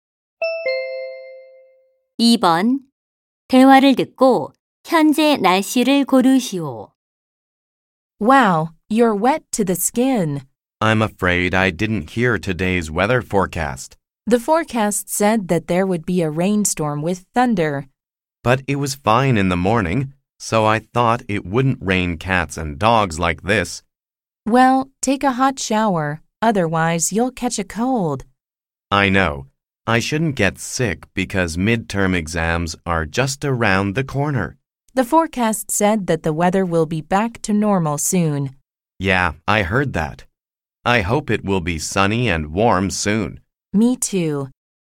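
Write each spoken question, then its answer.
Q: 대화를 듣고 현재 날씨를 고르시오.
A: 비가 많이 오고 천둥이 침 (폭풍우)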